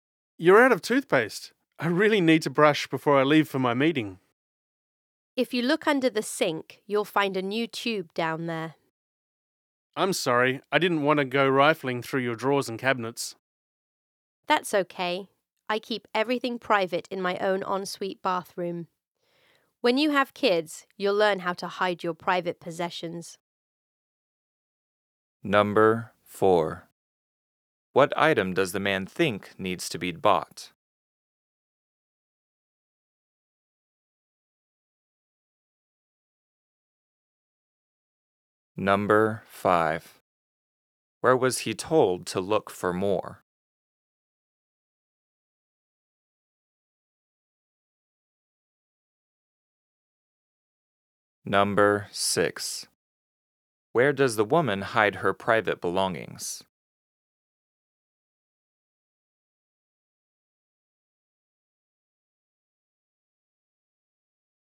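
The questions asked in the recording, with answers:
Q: What item does the man think needs to be bought?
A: Toothpaste

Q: Where was he told to look for more?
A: Under the sink

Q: Where does the woman hide her private belongings?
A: In her own ensuite bathroom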